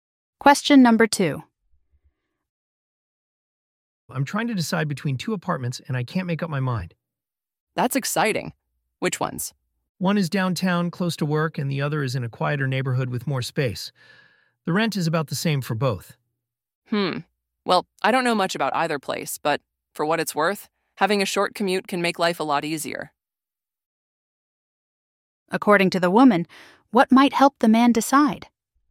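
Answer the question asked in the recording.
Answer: Choosing a place with a short commute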